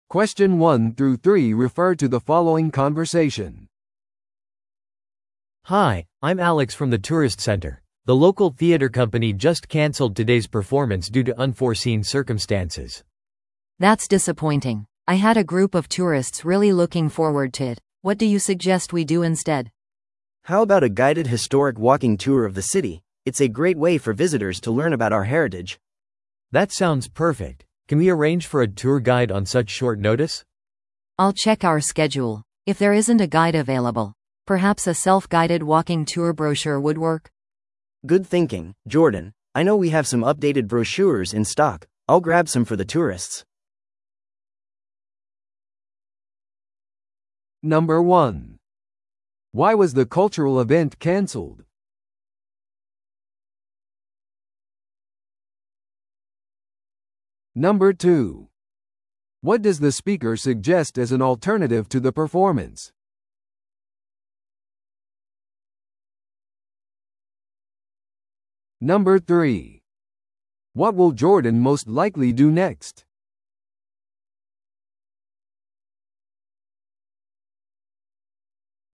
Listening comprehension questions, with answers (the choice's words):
Listen to the audio below and answer the questions.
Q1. Why was the cultural event canceled?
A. 出演者が準備できていなかった。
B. 別の日にスケジュール変更された。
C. 予期せぬ事態が発生した。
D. チケットが十分に売れなかった。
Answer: 予期せぬ事態が発生した。

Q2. What does the speaker suggest as an alternative to the performance?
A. 地元の博物館に行く。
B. 歴史的なウォーキングツアーに参加する。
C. 都市バスツアーに行く。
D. 別の劇場公演に参加する。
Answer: 歴史的なウォーキングツアーに参加する。

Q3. What will Jordan most likely do next?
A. 新しいツアーガイドを雇う。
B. 追加でパンフレットを印刷するよう依頼する。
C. ウォーキングツアーのパンフレットを配布する。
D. 団体のツアー予約をキャンセルする。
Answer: ウォーキングツアーのパンフレットを配布する。

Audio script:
A: Hi, I'm Alex from the tourist center. The local theater company just canceled today's performance due to unforeseen circumstances.
B: That's disappointing. I had a group of tourists really looking forward to it. What do you suggest we do instead?
C: How about a guided historic walking tour of the city? It's a great way for visitors to learn about our heritage.
A: That sounds perfect. Can we arrange for a tour guide on such short notice?
B: I'll check our schedule. If there isn't a guide available, perhaps a self-guided walking tour brochure would work?
C: Good thinking, Jordan. I know we have some updated brochures in stock. I'll grab some for the tourists.